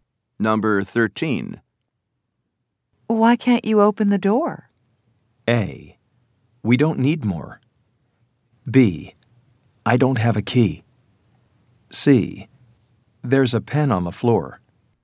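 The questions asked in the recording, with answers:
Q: Why can't you open the door?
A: B: I don't have a key.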